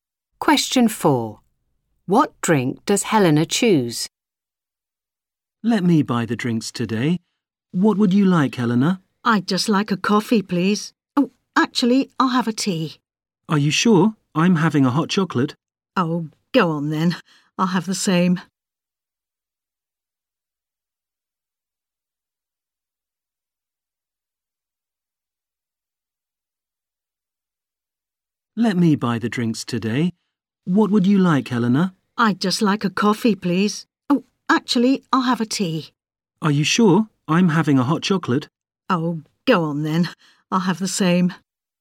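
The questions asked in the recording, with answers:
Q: What drink does Helena choose?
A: Hot chocolate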